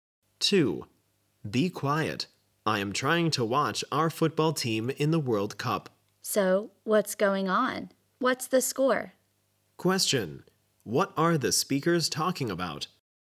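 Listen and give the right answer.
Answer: A World Cup football match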